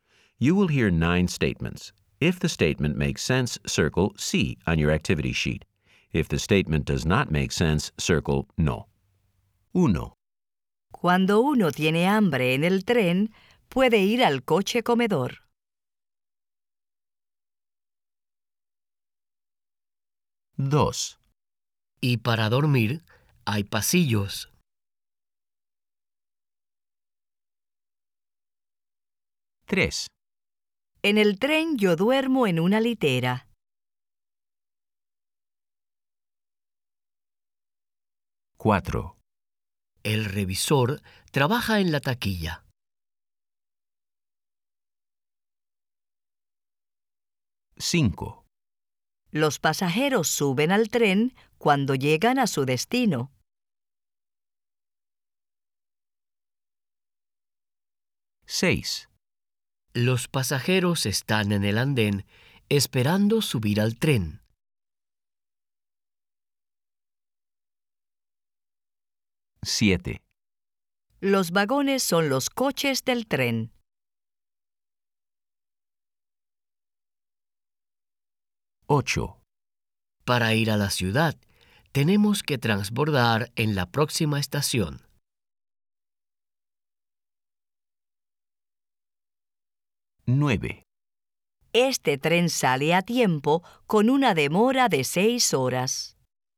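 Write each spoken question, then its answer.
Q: Cuando uno tiene hambre en el tren, puede ir al coche comedor.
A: Sí

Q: Y para dormir, hay pasillos.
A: No

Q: En el tren yo duermo en una litera.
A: Sí

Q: El revisor trabaja en la taquilla.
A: No

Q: Los pasajeros suben al tren cuando llegan a su destino.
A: No

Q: Los pasajeros están en el andén esperando subir al tren.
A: Sí

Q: Los vagones son los coches del tren.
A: Sí

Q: Para ir a la ciudad, tenemos que transbordar en la próxima estación.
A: Sí

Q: Este tren sale a tiempo con una demora de 6 horas.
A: No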